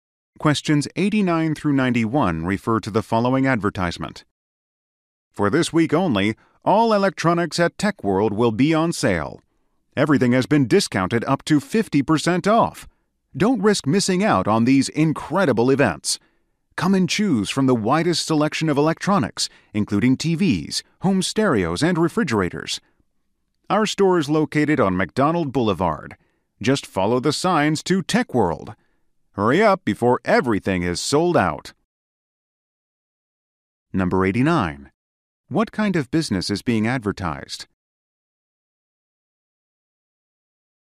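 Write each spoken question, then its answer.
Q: What kind of business is being advertised?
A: An electronics store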